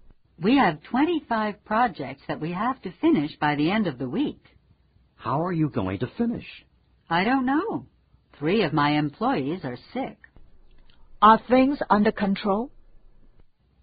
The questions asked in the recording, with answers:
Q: Are things under control?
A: No, things are not under control.